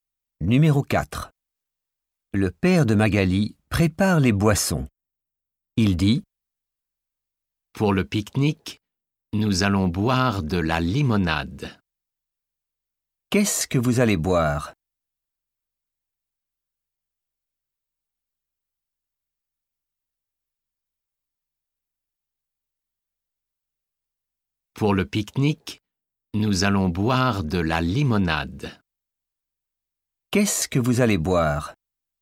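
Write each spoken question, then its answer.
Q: Qu'est-ce que vous allez boire ?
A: de la limonade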